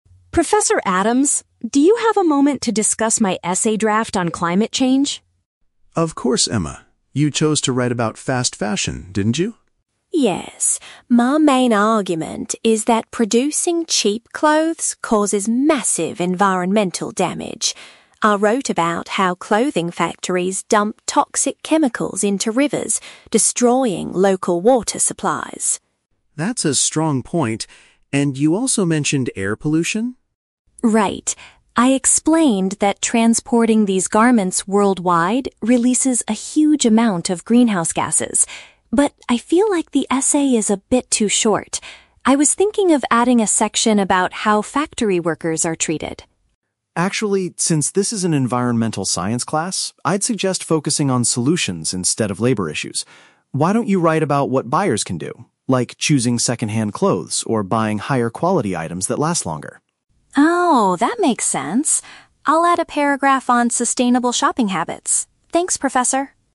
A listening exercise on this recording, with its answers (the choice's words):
Listen to a conversation between a student and her professor. Choose the correct answer (A, B, or C) for each question.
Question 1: What environmental issue does Emma mention regarding clothing factories?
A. They release harmful gases into the air.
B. They contaminate natural water sources.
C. They cut down too many forests for materials.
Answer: They contaminate natural water sources.

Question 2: What did Emma initially want to add to her essay?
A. Information about the working conditions in the industry.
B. A paragraph about eco-friendly shopping methods.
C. Details about how to properly recycle old garments.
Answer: Information about the working conditions in the industry.

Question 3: What does the professor advise Emma to focus on?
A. How the cheap garments are transported globally.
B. How consumers can help solve the fashion problem.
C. How the factory employees are currently treated.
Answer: How consumers can help solve the fashion problem.

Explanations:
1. Emma says that factories "dump toxic chemicals into rivers, destroying local water supplies." (Paraphrasing: contaminate = dump toxic chemicals; natural water sources = rivers/water supplies). Why the trap is wrong: Option (A) is a trap. Harmful gases (greenhouse gases) are mentioned in the audio, but Emma says transporting the clothes causes this, not the factories themselves. Option (C) is unmentioned.
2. Emma states, "I was thinking of adding a section about how factory workers are treated." (Paraphrasing: working conditions = how workers are treated). Why the trap is wrong: Option (B) is the trap. Emma does decide to write about eco-friendly shopping methods at the very end, but this is after the professor's advice. The question asks what she initially wanted to add. Option (C) is plausible but not mentioned.
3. Dr. Adams suggests focusing on solutions and asks, "Why don't you wri

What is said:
Emma: Professor Adams, do you have a moment to discuss my essay draft on climate change?
Dr. Adams: Of course, Emma. You chose to write about fast fashion, didn't you?
Emma: Yes. My main argument is that producing cheap clothes causes massive environmental damage. I wrote about how clothing factories dump toxic chemicals into rivers, destroying local water supplies.
Dr. Adams: That's a strong point. And you also mentioned air pollution?
Emma: Right. I explained that transporting these garments worldwide releases a huge amount of greenhouse gases. But I feel like the essay is a bit too short. I was thinking of adding a section about how factory workers are treated.
Adams: Actually, since this is an environmental science class, I'd suggest focusing on solutions instead of labor issues. Why don't you write about what buyers can do? Like choosing second-hand clothes or buying higher-quality items that last longer.
Emma: Oh, that makes sense. I'll add a paragraph on sustainable shopping habits. Thanks, Professor!